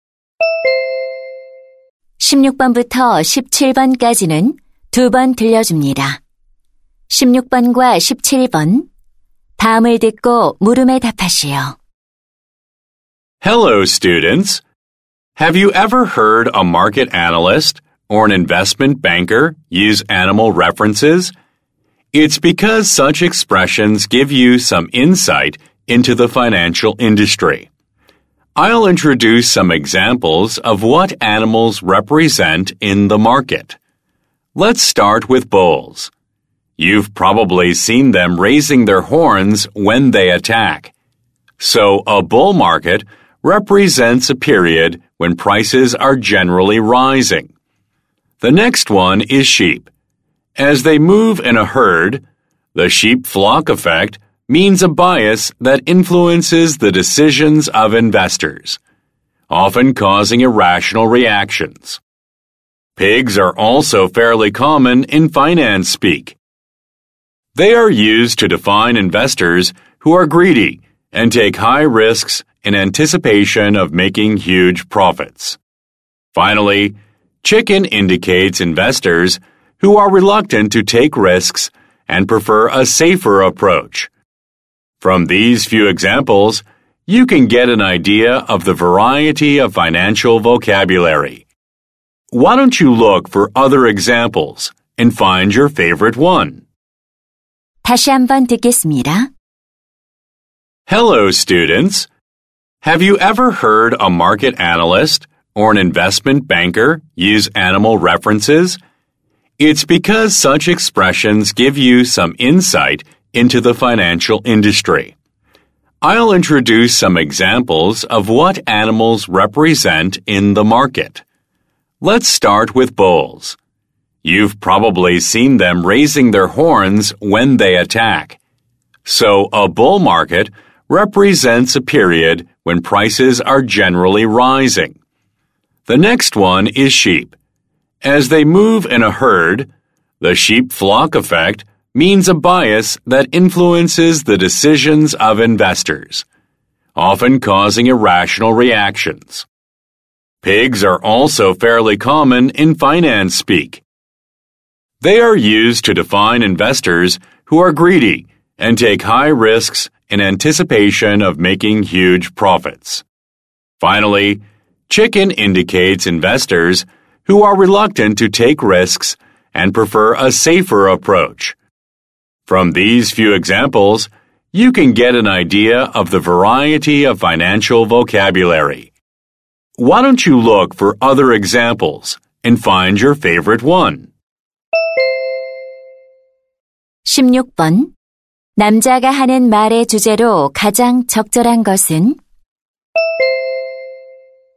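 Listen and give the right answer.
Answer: 금융 시장에서 동물 표현이 나타내는 의미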